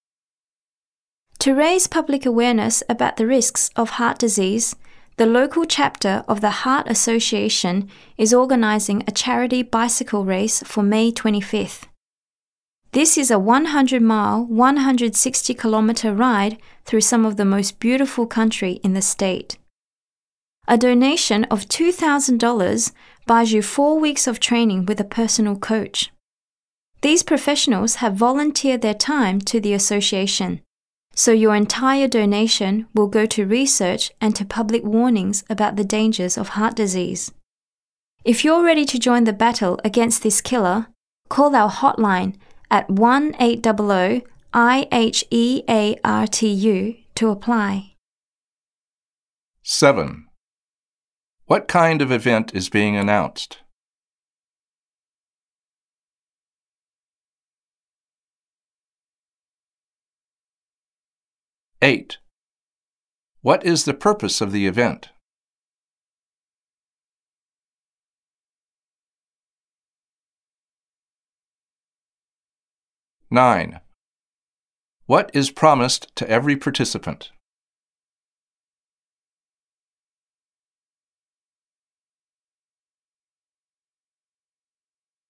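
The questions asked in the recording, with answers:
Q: What kind of event is being announced?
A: A charity bicycle race

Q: What is the purpose of the event?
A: To raise public awareness about the risks of heart disease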